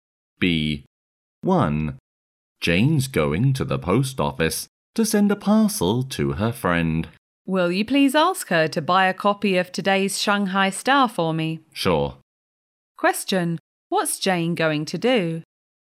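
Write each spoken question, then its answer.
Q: what's Jane going to do?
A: Go to the post office to send a parcel to her friend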